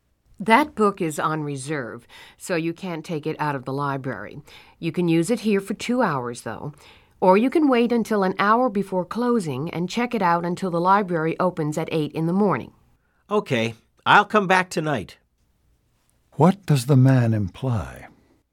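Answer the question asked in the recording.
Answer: He will come back tonight to check the book out overnight.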